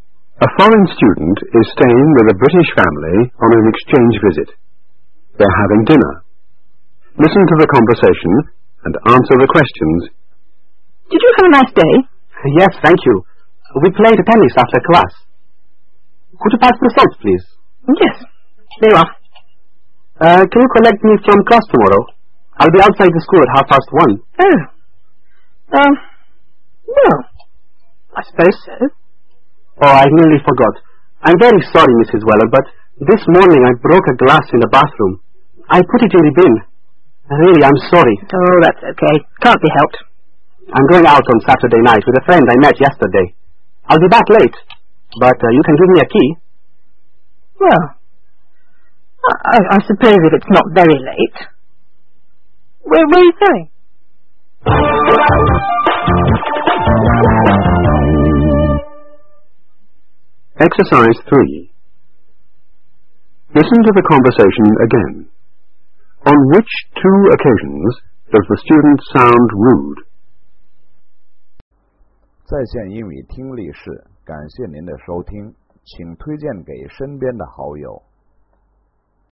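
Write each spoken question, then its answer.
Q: On which two occasions does the student sound rude?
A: When asking Mrs Weller to collect them from class tomorrow, and when telling her to give them a key for Saturday night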